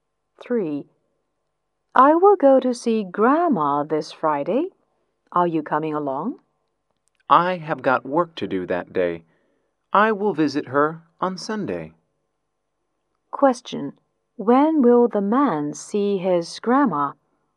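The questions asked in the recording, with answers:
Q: When will the man see his grandma?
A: On Sunday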